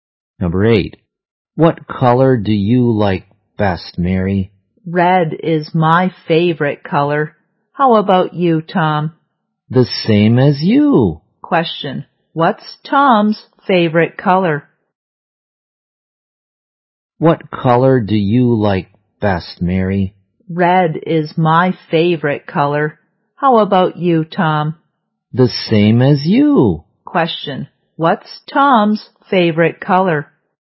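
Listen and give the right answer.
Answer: Red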